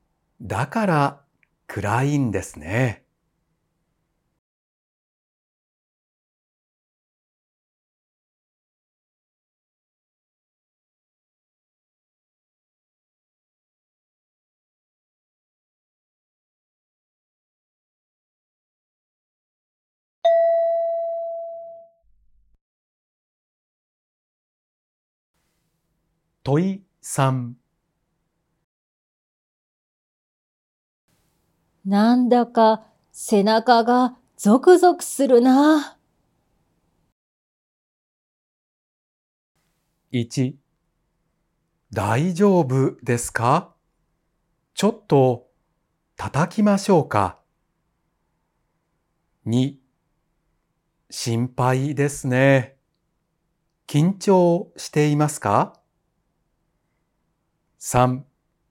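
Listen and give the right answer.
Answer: 3: 寒いですか?毛布を持ってきましょうか?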